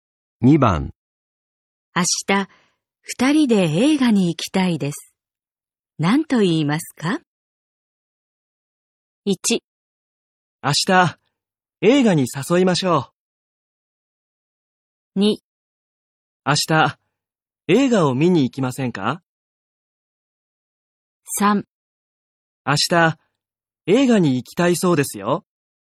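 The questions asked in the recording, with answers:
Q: 明日、二人で映画に行きたいです。何と言いますか?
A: 2: 明日、映画を見に行きませんか?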